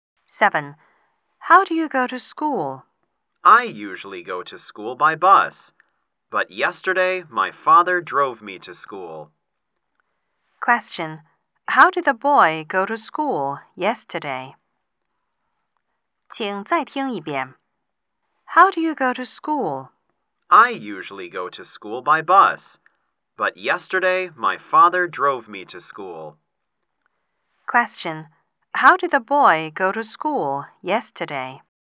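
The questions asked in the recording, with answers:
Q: Question. How did the boy go to school yesterday?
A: By car; his father drove him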